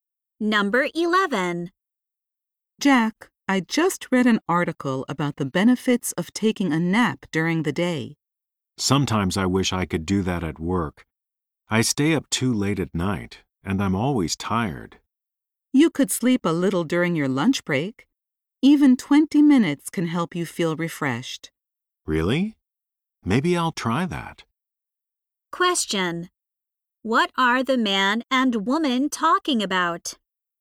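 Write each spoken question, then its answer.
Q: What are the man and woman talking about?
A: The benefits of taking a nap during the day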